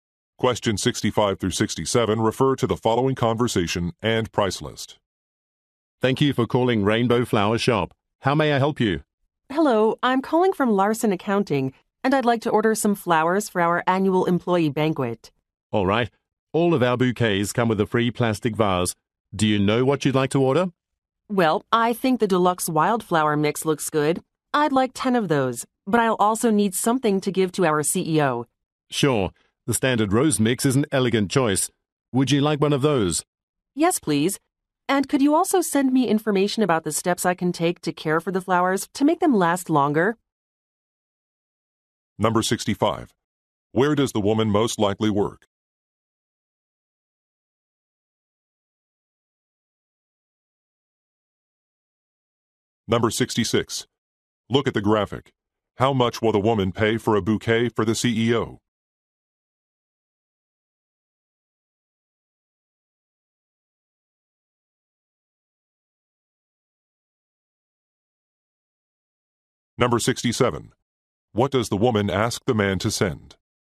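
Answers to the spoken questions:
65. At an accounting firm
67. Information on caring for the flowers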